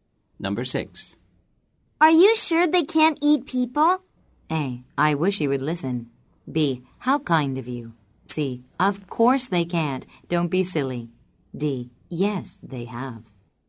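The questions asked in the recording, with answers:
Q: Are you sure they can't eat people?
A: C: Of course they can't. Don't be silly.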